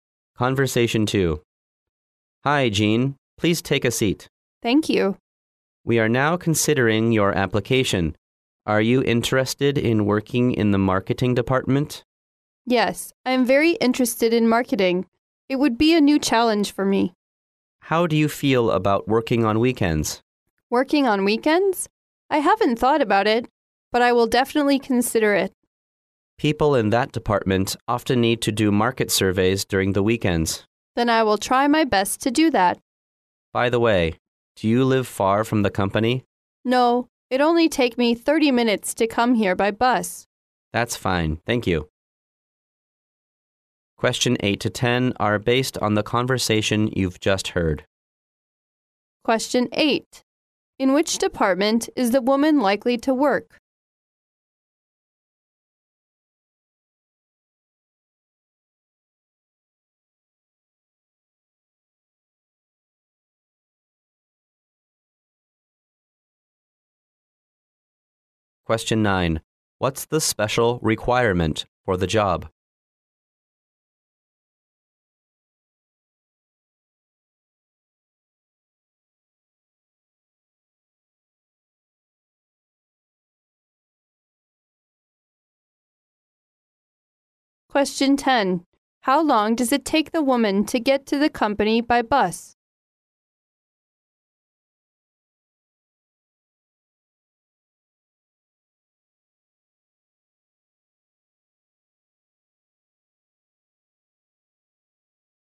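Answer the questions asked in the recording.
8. The marketing department
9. Working on weekends
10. 30 minutes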